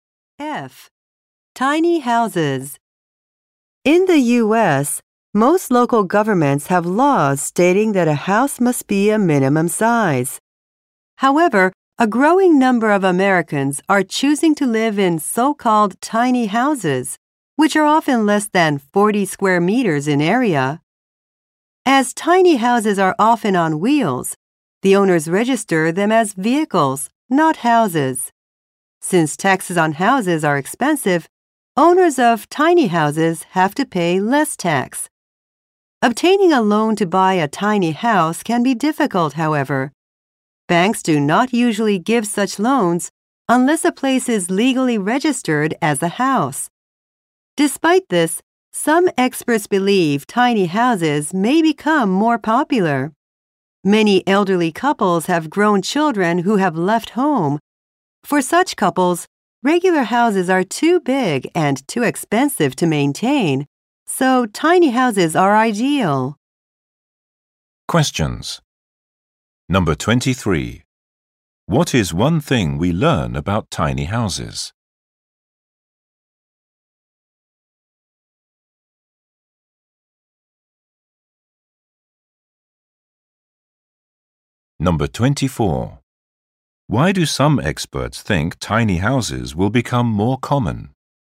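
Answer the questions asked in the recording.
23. Their owners pay less tax because they are registered as vehicles.
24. They suit elderly couples whose children have left home.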